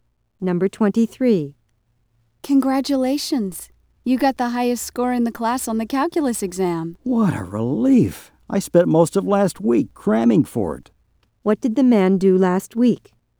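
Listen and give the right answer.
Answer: He studied hard (crammed) for the calculus exam.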